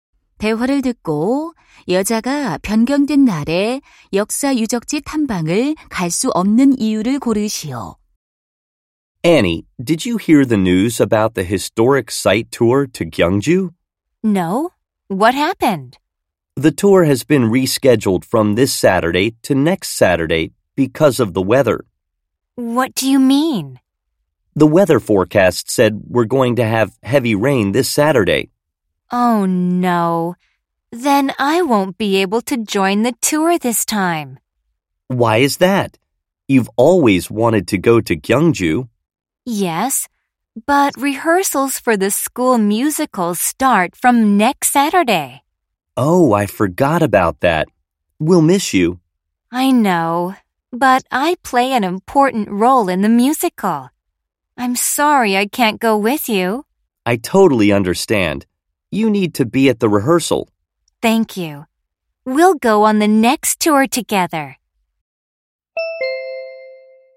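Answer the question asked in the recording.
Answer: 학교 뮤지컬 리허설이 있어서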